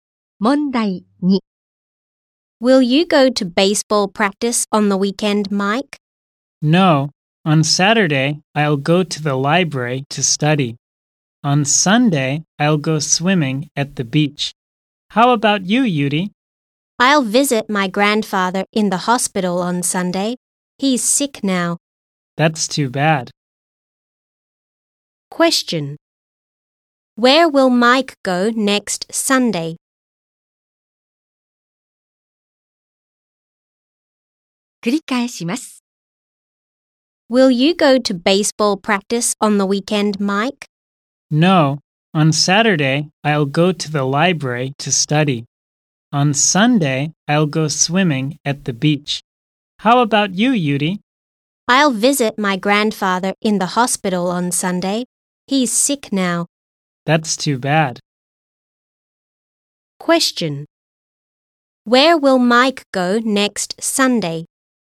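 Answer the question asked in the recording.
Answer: To the beach (to go swimming).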